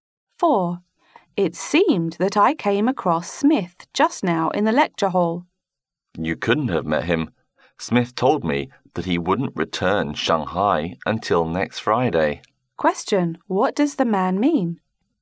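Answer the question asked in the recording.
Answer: The woman couldn't have seen Smith because he is away from Shanghai until next Friday.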